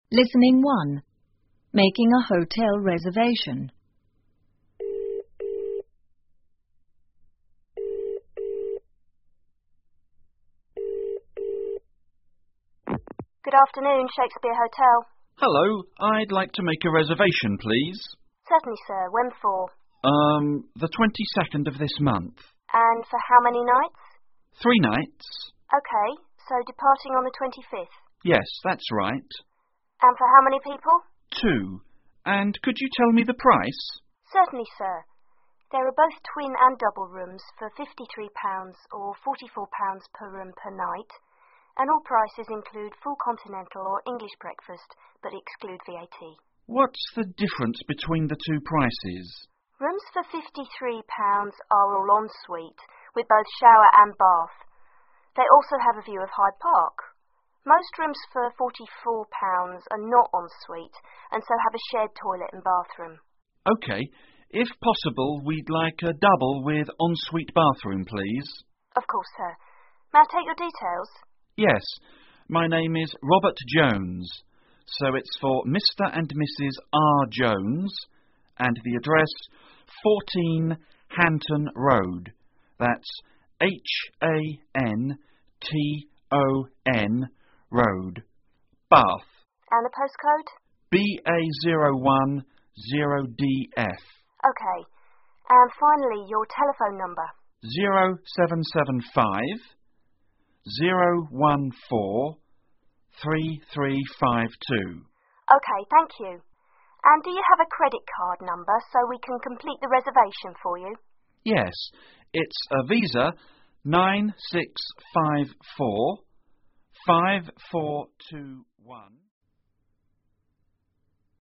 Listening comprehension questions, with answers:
下面是对话部分的内容, 请再听一次对话,在空格内填入遗漏的部分。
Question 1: Reservation Desk: Good ____________. Shakespeare Hotel.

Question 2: Guest : Hello, I'd like to make a ________ ,please.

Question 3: G: Urm. The 22nd of ______________.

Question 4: G: Two. And could you tell me the ____________?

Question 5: RD: Certainly , Sir. There are both _________ and ______________rooms for & 53 and & 44 per room per night.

请根据对话内容,判断下面的句子是否正确,如果和符合对话内容,请在请在T做记号,如果不符合,请在F做记号。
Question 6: The guest will arrive on the 25th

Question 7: The guest wants to know why the prices of the rooms are different.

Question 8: En-suite rooms are more expensive but don't have a view of the park.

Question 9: The guest has a VISA credit card.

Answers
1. afternoon
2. reservation
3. this month
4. price
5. twin, double
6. F
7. T
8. F
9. T

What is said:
Reservation Desk:Good afternoon.Shakespeare Hotel.
Guest:Hello.I'd like to make a reservation,please.
RD:Certainly,Sir.When for?
G:Urm.The 22nd of this month.
RD:And for how many nights?
G:Three nights.
RD:OK.So departing on the 25th.
G:Yes,that's right.
G:Two.And could you tell me the price?
RD:Certainly,Sir.There are both twin and double rooms for £53 and £44 per room per night.And all prices include full continental or English breakfast but exclude VAT.
G:What's the difference between the two prices?
RD:Rooms for £53 are all en-suite,with both shower and bath.They also have a view of Hyde Park.Most rooms for £44 are not en-suite and so have a shared toilet and bathroom.
G:OK.If possible,we'd like a double with en-suite bathroom,please.
RD:Of course,Sir.May I take your details?
G:Yes.My name is Robert Jones.So it's for Mr and Mrs R. Jones.And the address,14 Hanton Road.That's H-A-N-T-O-N Road.Bath.
RD:OK.And finally your telephone number?
G:0775-014-3352
RD:OK,thank you.And do you have a credit card number so we can complete the reservation for you?
G:Yes.It's a VISA,9654-5421-...